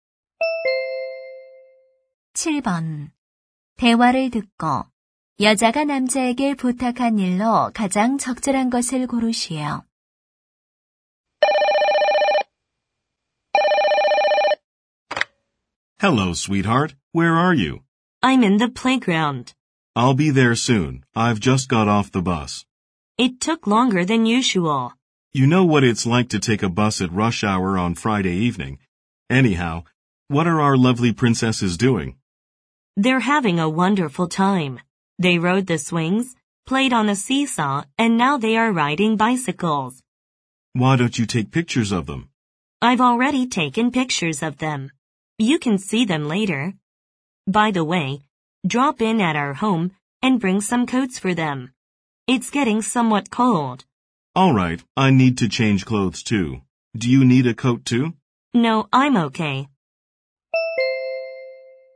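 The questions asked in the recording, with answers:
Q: 대화를 듣고 여자가 남자에게 부탁한 일로 가장 적절한 것을 고르시오.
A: 집에 들러 아이들의 코트를 가져오기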